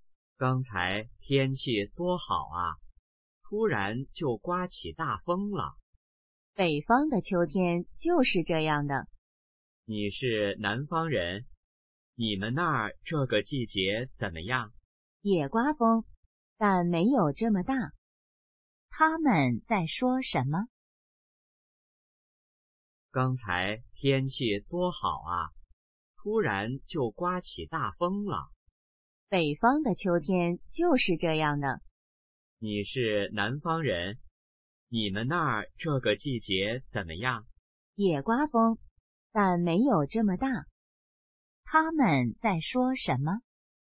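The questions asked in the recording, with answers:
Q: 他们在说什么?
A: 天气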